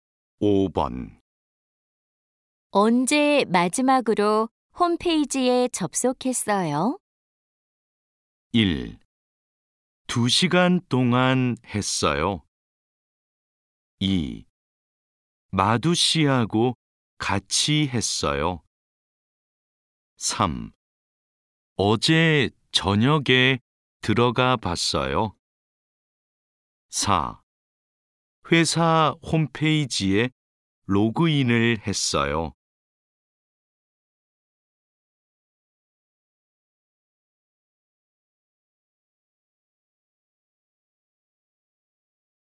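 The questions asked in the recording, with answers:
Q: 언제 마지막으로 홈페이지에 접속했어요?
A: 3: 어제 저녁에 들어가 봤어요.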